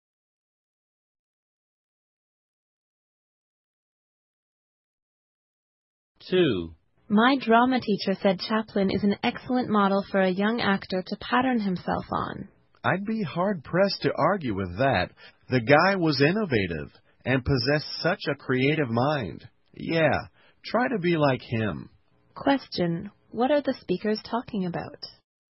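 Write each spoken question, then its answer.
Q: What are the speakers talking about?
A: Chaplin as a good model for young actors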